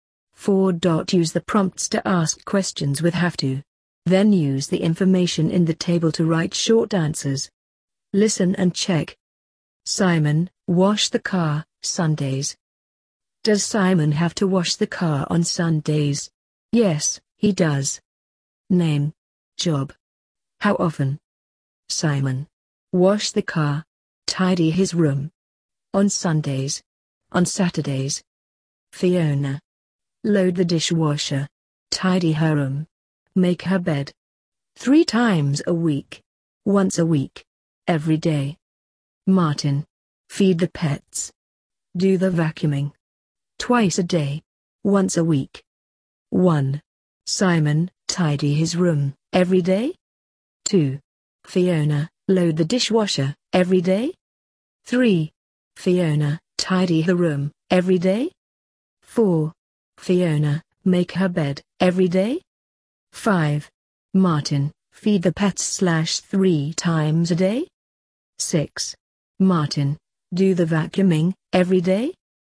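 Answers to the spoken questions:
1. No, he doesn't (on Saturdays).
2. No, she doesn't (3 times a week).
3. No, she doesn't (once a week).
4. Yes, she does.
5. No, he doesn't (twice a day).
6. No, he doesn't (once a week).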